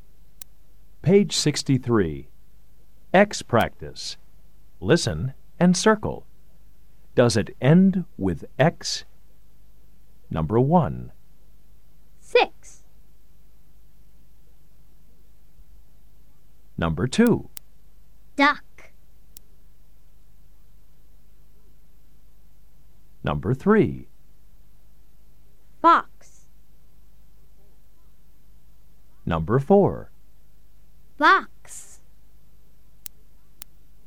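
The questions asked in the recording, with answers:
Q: Duck.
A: No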